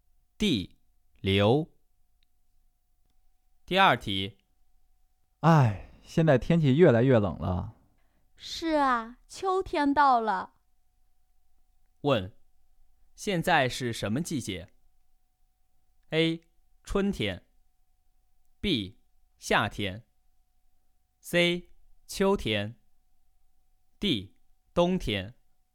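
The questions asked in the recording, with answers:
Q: 问,现在是什么季节?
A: C: 秋天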